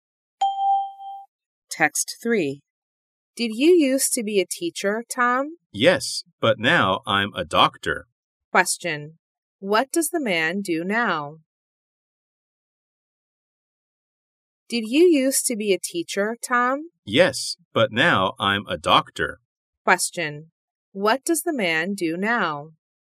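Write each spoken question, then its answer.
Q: What does the man do now?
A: He is a doctor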